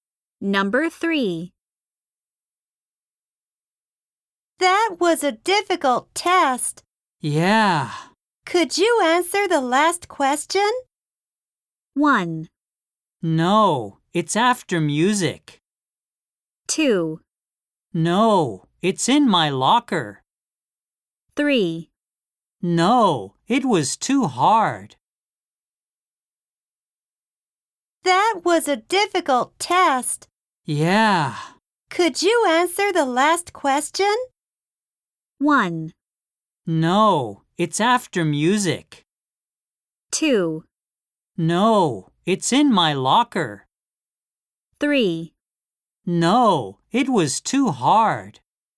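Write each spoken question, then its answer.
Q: Could you answer the last question?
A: 3: No, it was too hard.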